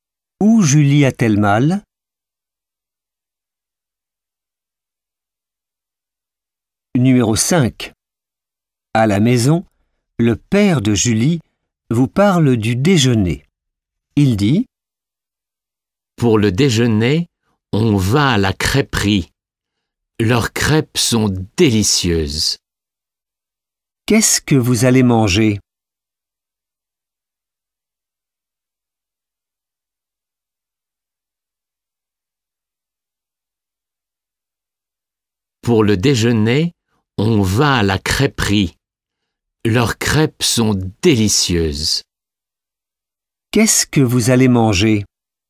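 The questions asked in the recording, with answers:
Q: Qu'est-ce que vous allez manger?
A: Des crêpes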